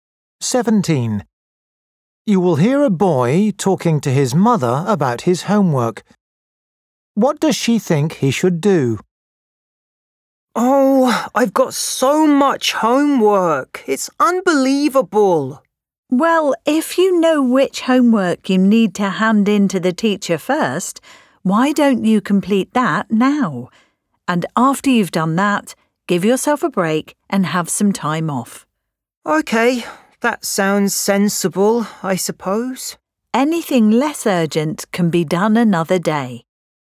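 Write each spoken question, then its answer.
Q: What does she think he should do?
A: finish the most urgent homework first, then take a break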